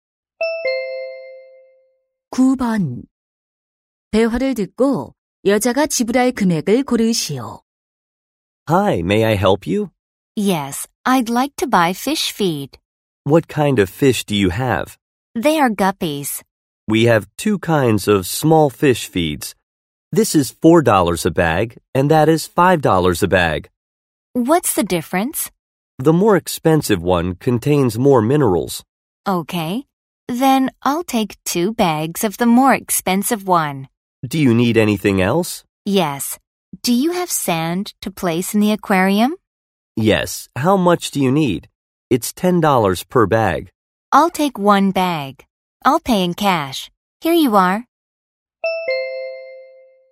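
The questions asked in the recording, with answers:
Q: 대화를 듣고 여자가 지불할 금액을 고르시오.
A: 20달러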